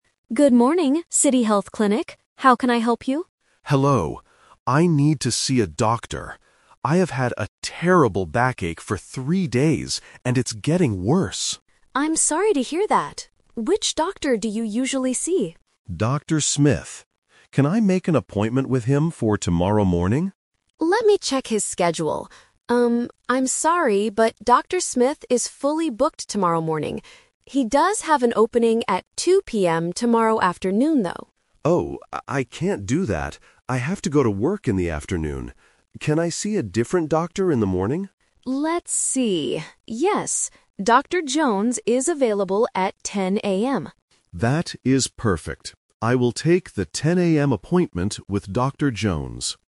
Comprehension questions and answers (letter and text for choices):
Listen to a phone conversation between a patient and a clinic receptionist. Choose the correct answer (A, B, or C) for each question.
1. What is the patient's health problem?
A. He has had a terrible headache for three days.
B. He has a very painful backache.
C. He hurt his leg at work.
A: B. He has a very painful backache.

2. Why CANNOT the patient see Dr. Smith tomorrow morning?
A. Dr. Smith is not working tomorrow.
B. Dr. Smith is completely busy at that time.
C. Dr. Smith only sees patients in the afternoon.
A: B. Dr. Smith is completely busy at that time.

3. What is the patient's final decision?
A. He will see Dr. Smith tomorrow afternoon.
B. He will just go to work and not see a doctor.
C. He will see a different doctor in the morning.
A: C. He will see a different doctor in the morning.

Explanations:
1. The patient explicitly says, "I have had a terrible backache for three days." The Trap: Option A is a trap. The audio mentions "three days" and "terrible," but the symptom is a backache, not a headache. Option C is a plausible reason to see a doctor, but it is not mentioned.
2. The receptionist says, "Dr. Smith is fully booked tomorrow morning." Fully booked means he is completely busy. The Trap: Option C is a trap. The receptionist says he has an opening in the afternoon, but that does not mean he only works in the afternoon. Option A is incorrect because he is working, just busy.
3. The patient agrees to take the 10:00 AM appointment with Dr. Jones, which means seeing a different doctor in the morning. The Trap: Option A is the A2 "Twist" trap. The receptionist offers an afternoon appointment with Dr. Smith, but the patient rejects it because he has to work. Option B is a trap because the patient mentions "I have to go to work," but he still decides to see a doctor before work.

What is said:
Receptionist: Good morning, City Health Clinic. How can I help you?
Patient: Hello. I need to see a doctor. I have had a terrible backache for three days, and it's getting worse.
Receptionist: I'm sorry to hear that. Which doctor do you usually see?
Patient: Dr. Smith. Can I make an appointment with him for tomorrow morning?
Receptionist: Let me check his schedule. Um, I'm sorry, but Dr. Smith is fully booked tomorrow morning. He does have an opening at 2:00 PM tomorrow afternoon, though.
Patient: Oh, I can't do that. I have to go to work in the afternoon. Can I see a different doctor in the morning?
Receptionist: Let's see... Yes, Dr. Jones is available at 10:00 AM.
Patient: That is perfect. I will take the 10:00 AM appointment with Dr. Jones.

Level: A2